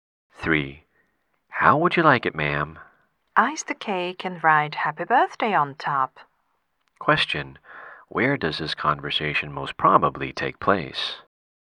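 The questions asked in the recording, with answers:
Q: Where does this conversation most probably take place?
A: In a bakery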